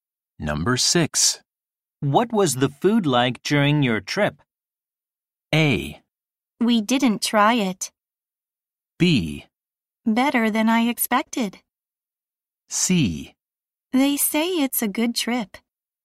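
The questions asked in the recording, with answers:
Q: What was the food like during your trip?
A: B: Better than I expected.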